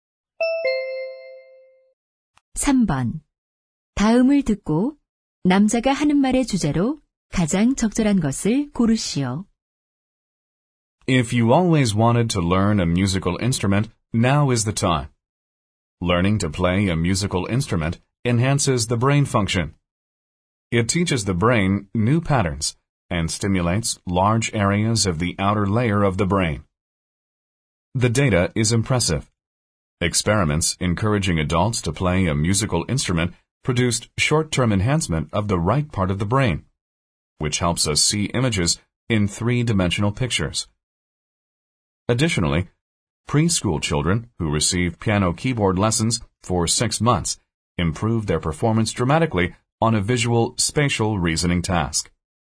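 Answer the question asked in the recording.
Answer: 악기 연주를 배우는 것이 뇌 기능에 주는 이점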